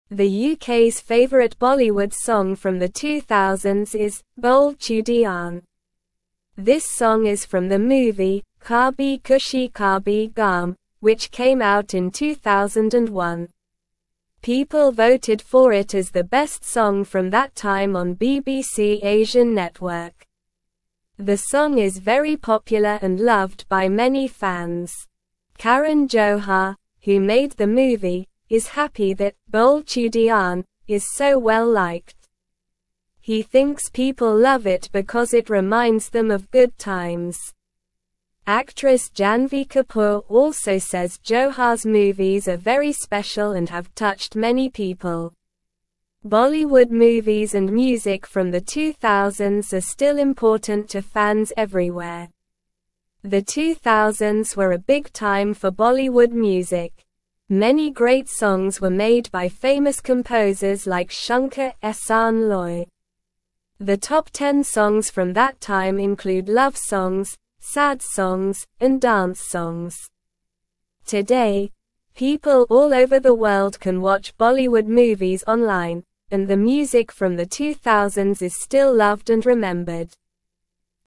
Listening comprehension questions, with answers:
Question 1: The UK's favorite (1)______ song from the 2000s is "Bole Chudiyan."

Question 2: This song is from the (2)______ "Kabhi (3)______ Kabhie Gham," which came out in 2001.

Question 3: This song is from the (2)______ "Kabhi (3)______ Kabhie Gham," which came out in 2001.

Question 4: The song is very popular and loved by many (4)______.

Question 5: He thinks (5)______ love it because it reminds them of (6)______ times.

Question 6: He thinks (5)______ love it because it reminds them of (6)______ times.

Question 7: Actress Janhvi Kapoor also says Johar's (7)______ are very special and have touched (8)______ people.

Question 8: Actress Janhvi Kapoor also says Johar's (7)______ are very special and have touched (8)______ people.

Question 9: Bollywood movies and music from the 2000s are still (9)______ to fans everywhere.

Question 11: Today, people all over the (11)______ can (12)______ Bollywood movies online, and the music from the 2000s is still loved and remembered.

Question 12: Today, people all over the (11)______ can (12)______ Bollywood movies online, and the music from the 2000s is still loved and remembered.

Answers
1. Bollywood
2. movie
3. Khushi
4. fans
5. people
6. good
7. movies
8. many
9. important
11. world
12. watch

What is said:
The UK's favorite Bollywood song from the 2000s is "Bole Chudiyan." This song is from the movie "Kabhi Khushi Kabhie Gham," which came out in 2001. People voted for it as the best song from that time on BBC Asian Network. The song is very popular and loved by many fans.
Karan Johar, who made the movie, is happy that "Bole Chudiyan" is so well-liked. He thinks people love it because it reminds them of good times. Actress Janhvi Kapoor also says Johar's movies are very special and have touched many people. Bollywood movies and music from the 2000s are still important to fans everywhere.
The 2000s were a big time for Bollywood music. Many great songs were made by famous composers like Shankar-Ehsaan-Loy. The top 10 songs from that time include love songs, sad songs, and dance songs. Today, people all over the world can watch Bollywood movies online, and the music from the 2000s is still loved and remembered.

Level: Level 2